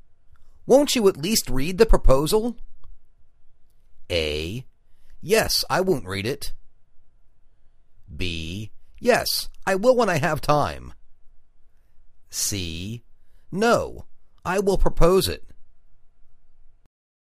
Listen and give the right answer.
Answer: Yes, I will when I have time.